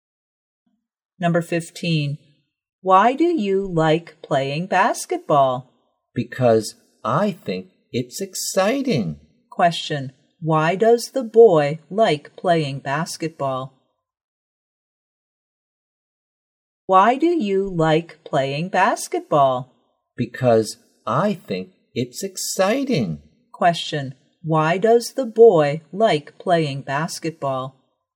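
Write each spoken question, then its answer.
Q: Question, why does the boy like playing basketball?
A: Because he thinks it's exciting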